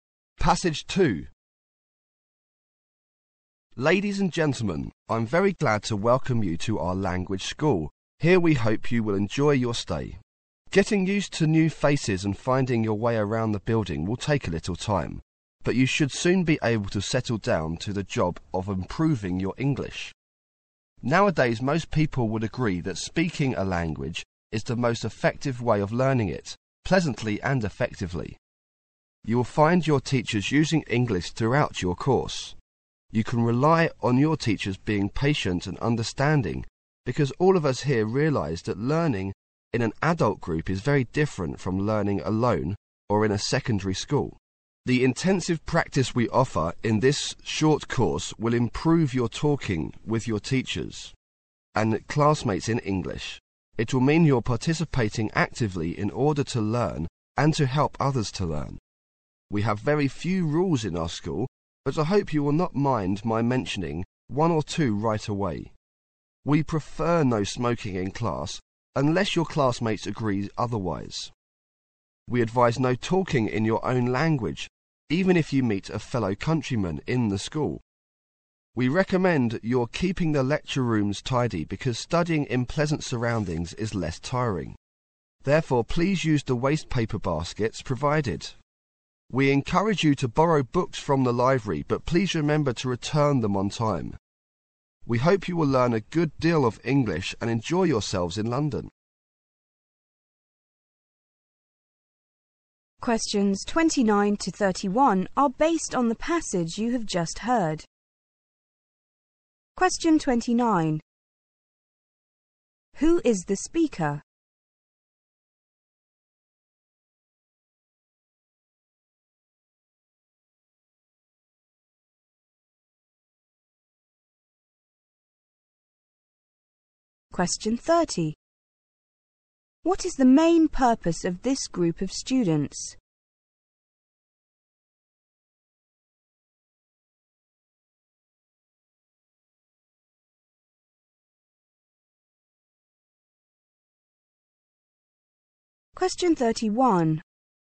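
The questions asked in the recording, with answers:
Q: What is the main purpose of this group of students?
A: To improve their English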